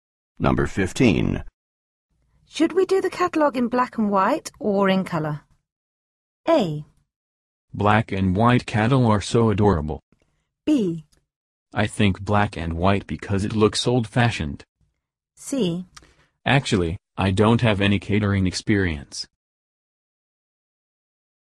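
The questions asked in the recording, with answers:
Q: Should we do the catalog in black and white or in color?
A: B: I think black and white because it looks old-fashioned.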